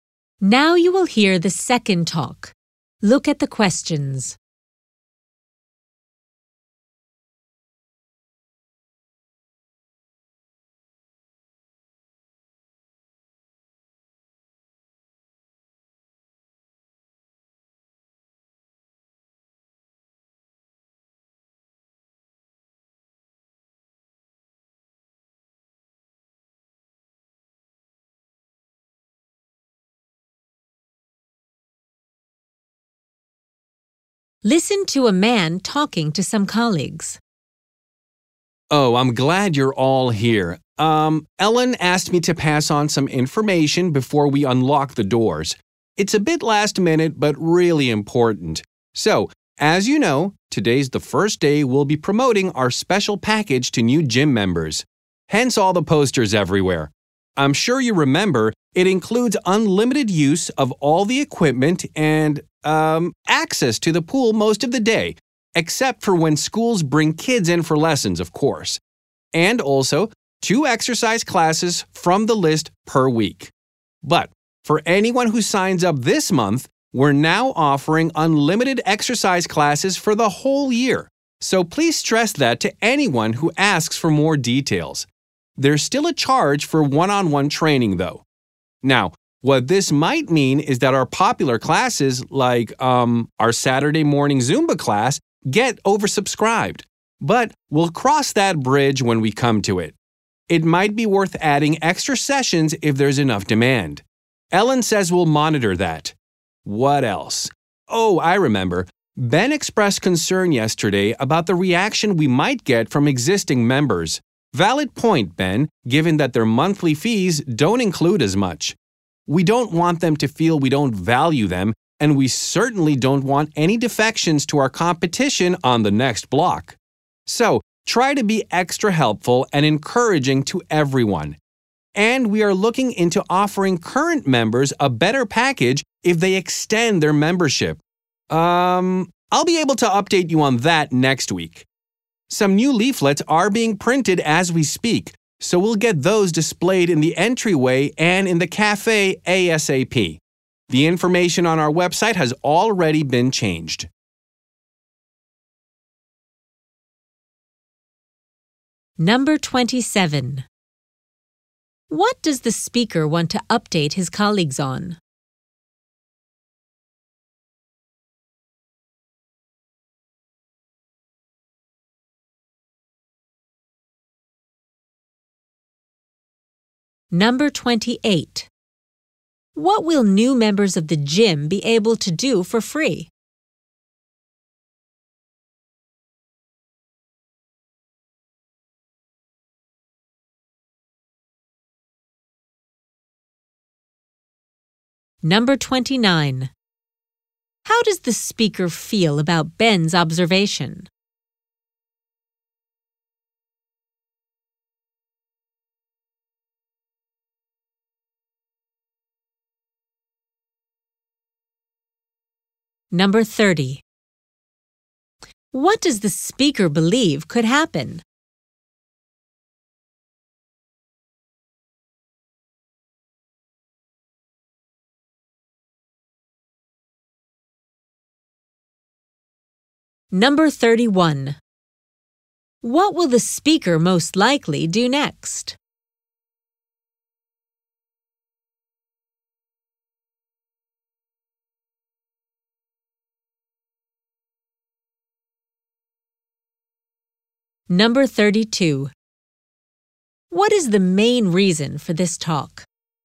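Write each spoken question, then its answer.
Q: What will new members of the gym be able to do for free?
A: Take unlimited exercise classes for a year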